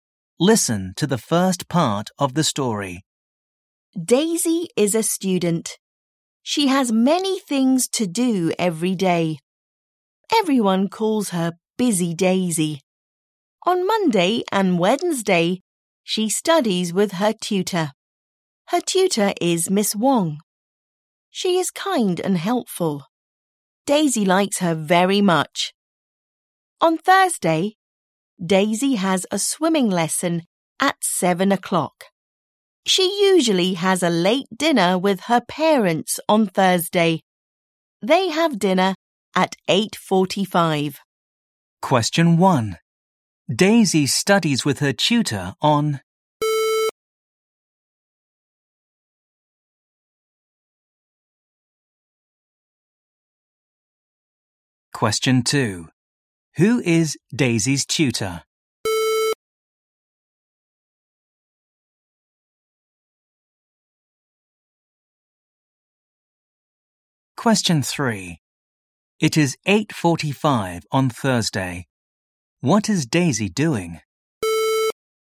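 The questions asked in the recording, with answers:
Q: Daisy studies with her tutor on...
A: Monday and Wednesday

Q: Who is Daisy's tutor?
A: Miss Wong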